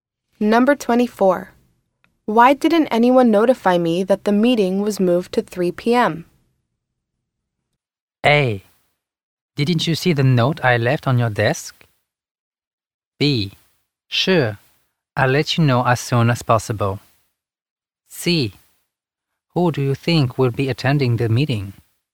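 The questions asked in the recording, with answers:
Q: Why didn't anyone notify me that the meeting was moved to 3 p.m.?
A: A: Didn't you see the note I left on your desk?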